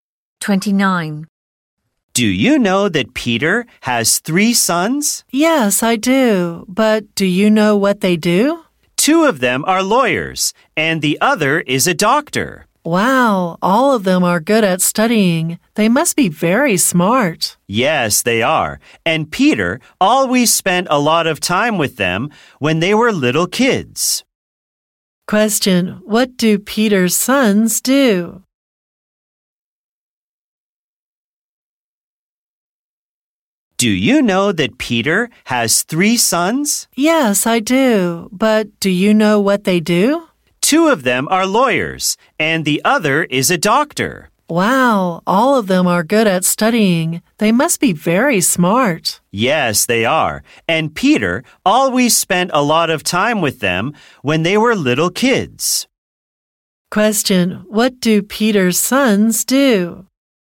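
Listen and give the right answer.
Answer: Two are lawyers and one is a doctor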